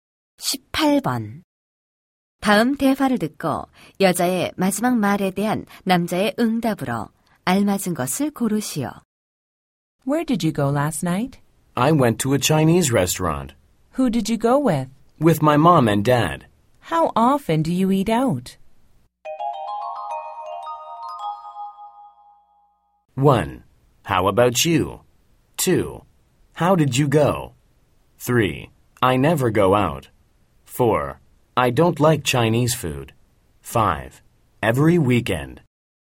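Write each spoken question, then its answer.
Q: 다음 대화를 듣고 여자의 마지막 말에 대한 남자의 응답으로 알맞은 것을 고르시오.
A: 5: Every weekend.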